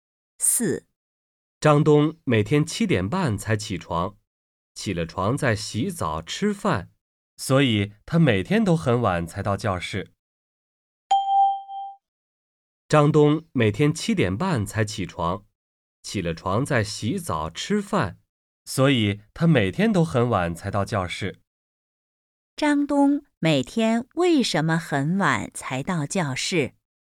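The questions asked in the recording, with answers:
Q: 张东每天为什么很晚才到教室?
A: 他七点半才起床,起床后还要洗澡吃饭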